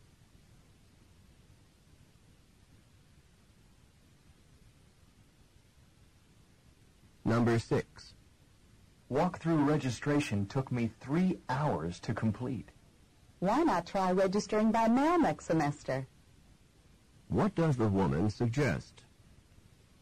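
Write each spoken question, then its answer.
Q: What does the woman suggest?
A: Registering by mail next semester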